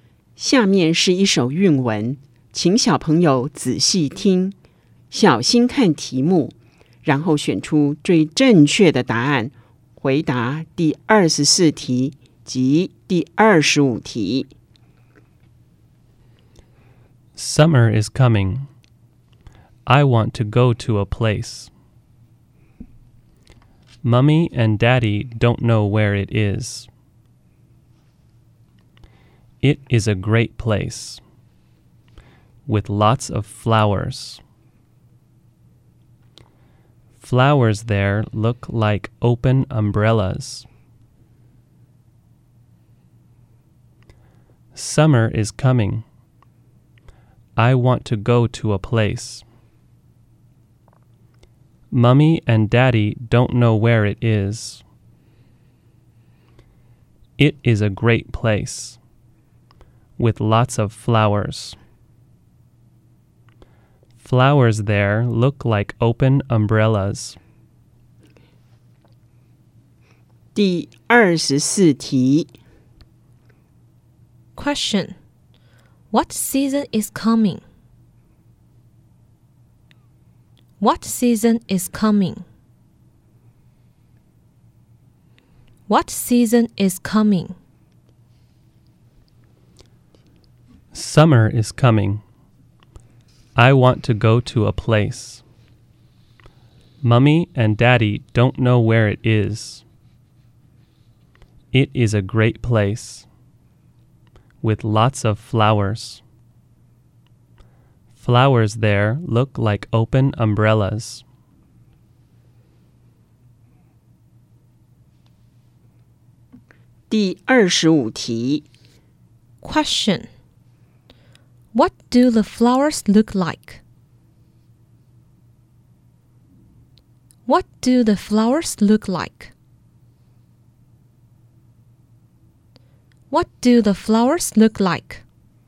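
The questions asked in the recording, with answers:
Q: Question. What season is coming?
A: Summer

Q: Question. What do the flowers look like?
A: Open umbrellas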